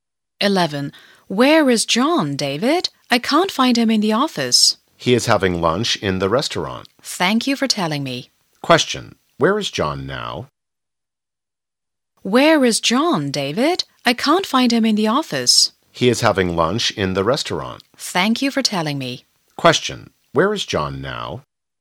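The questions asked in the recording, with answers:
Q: Where is John now?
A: In the restaurant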